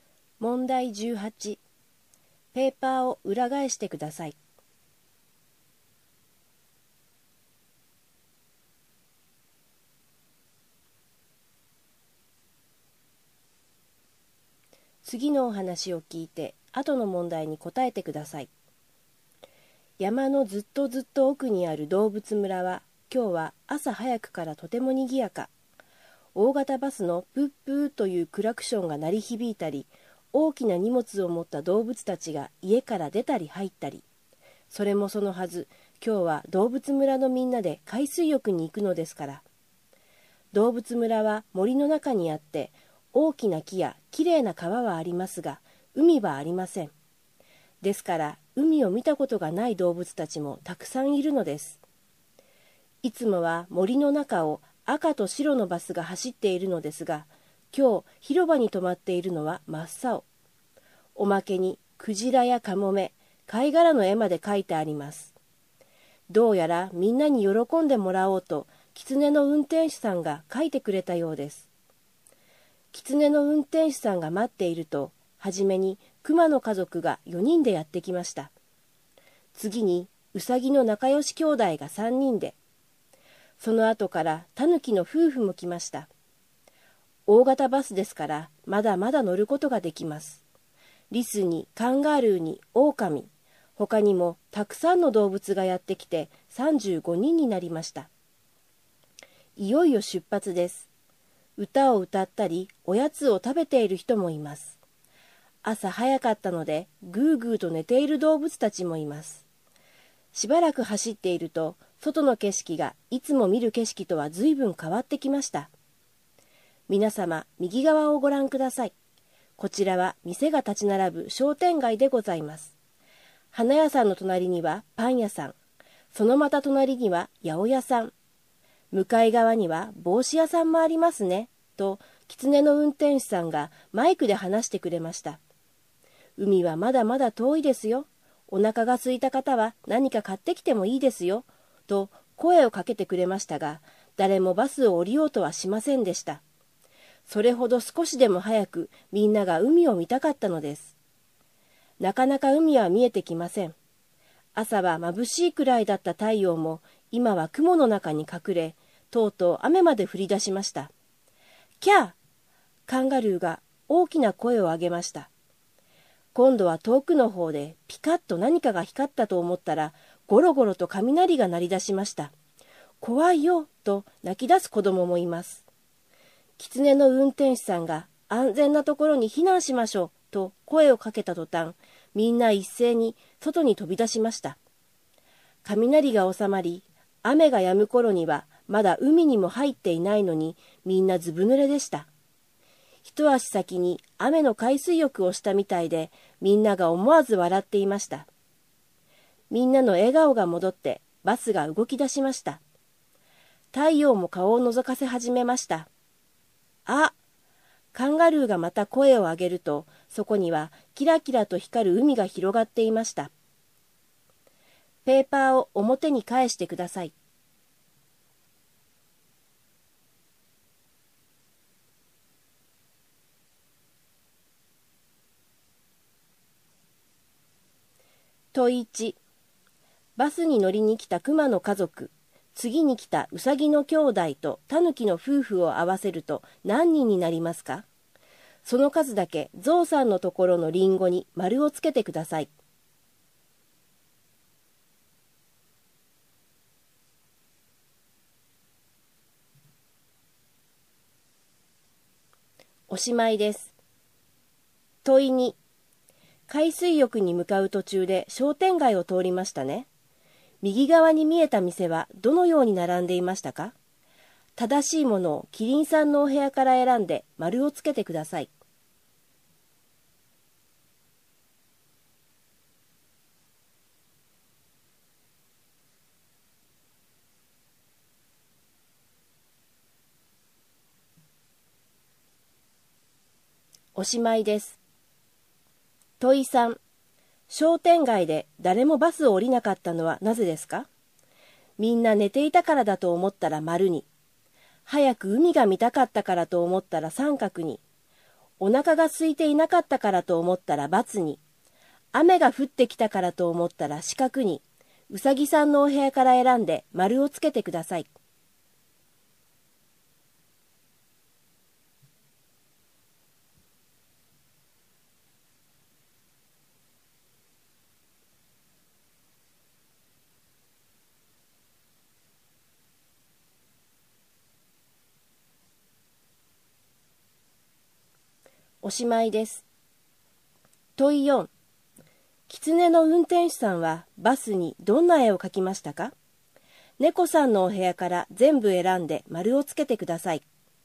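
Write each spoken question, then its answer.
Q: バスに乗りに来た熊の家族、次に来たウサギの兄弟とタヌキの夫婦を合わせると何人になりますか?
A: 9人

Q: 商店街で誰もバスを降りなかったのはなぜですか?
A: 三角: 早く海が見たかったから

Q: 狐の運転手さんはバスにどんな絵を描きましたか?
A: クジラ、カモメ、貝殻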